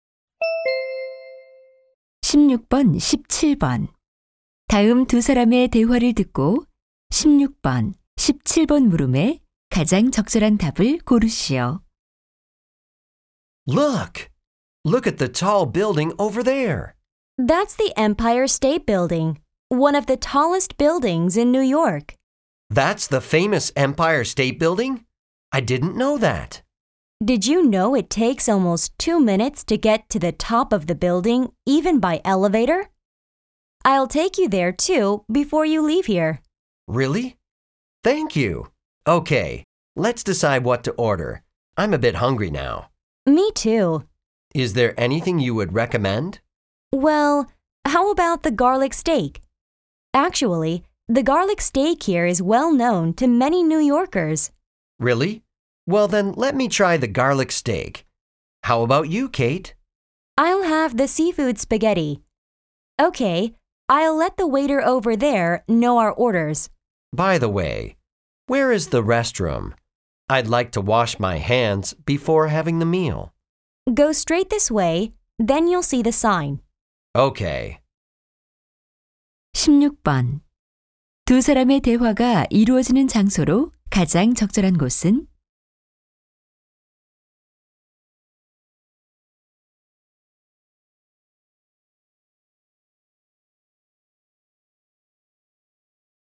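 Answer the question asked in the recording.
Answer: 식당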